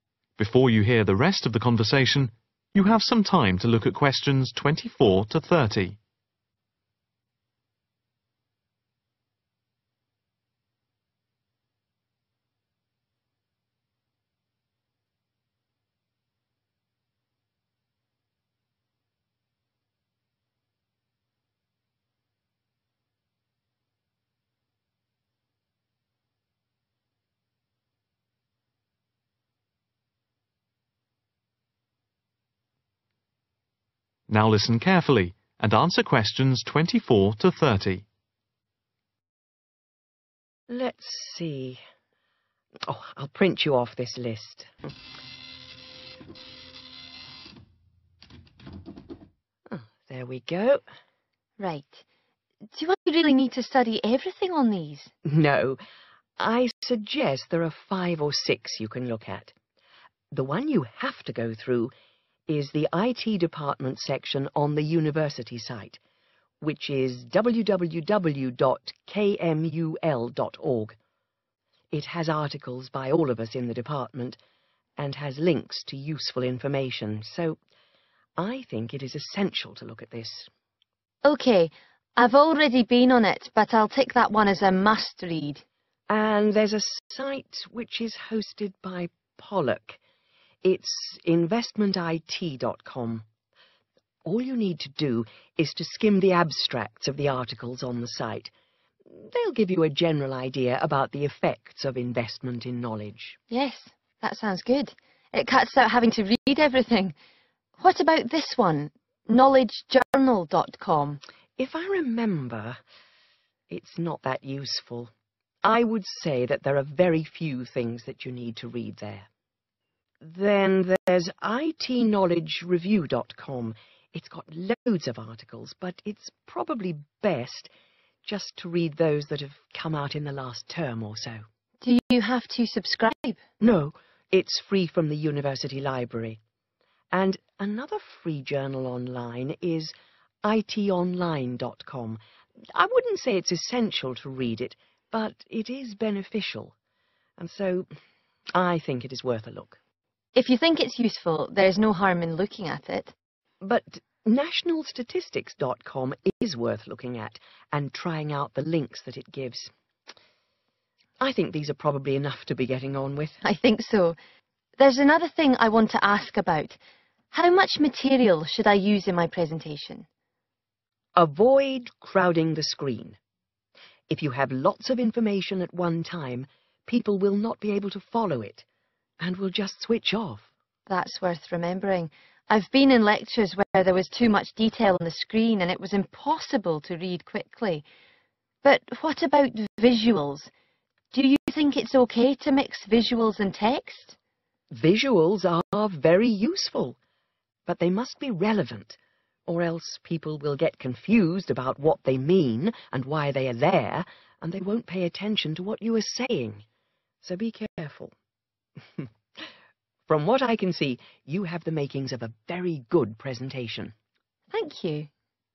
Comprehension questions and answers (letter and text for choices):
What recommendations does Dr Owen make about the websites?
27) IT_online.com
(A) must read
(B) read recent articles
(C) look at abstracts quickly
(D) check links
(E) scan references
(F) useful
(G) limited use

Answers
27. (F) useful